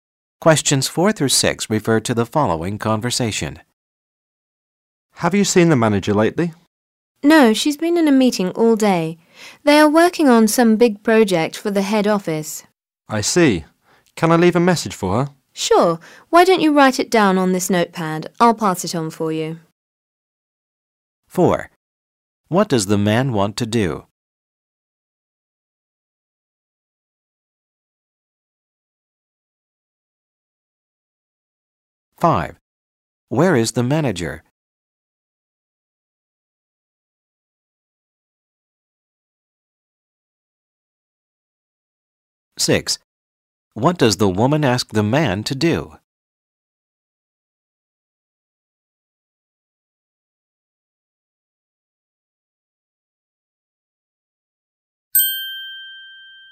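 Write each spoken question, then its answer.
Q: What does the man want to do?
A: Leave a message for the manager

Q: Where is the manager?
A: In a meeting

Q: What does the woman ask the man to do?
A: Write the message on the notepad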